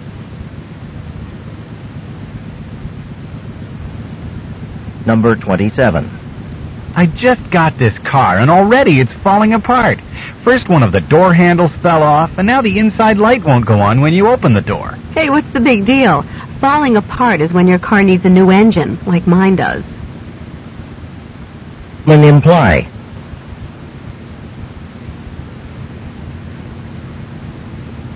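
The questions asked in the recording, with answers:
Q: Men imply.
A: The woman's car problems are minor.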